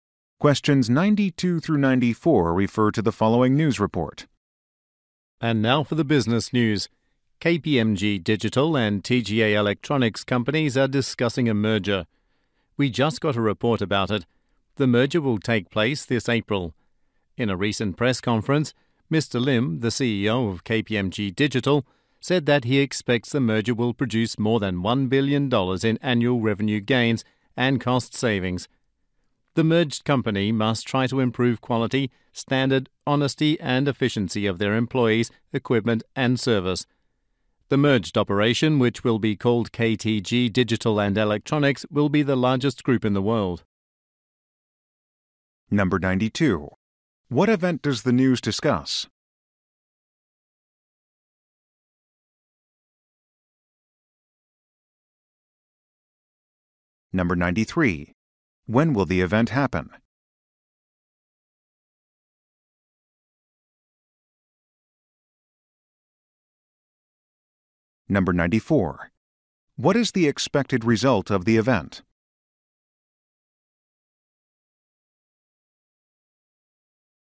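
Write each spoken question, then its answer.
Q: What event does the news discuss?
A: A merger

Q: When will the event happen?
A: This April

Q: What is the expected result of the event?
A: Over $1 billion in annual revenue gains and cost savings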